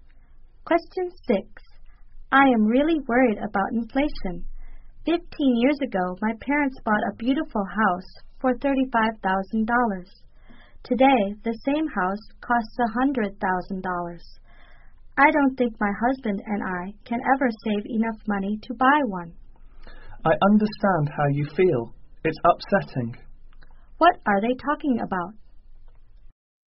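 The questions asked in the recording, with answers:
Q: What are they talking about?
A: Rising house prices (inflation)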